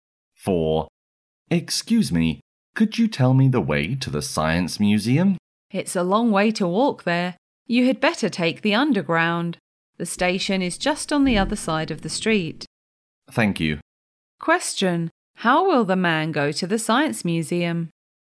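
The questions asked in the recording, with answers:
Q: How will the man go to the Science Museum?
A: By underground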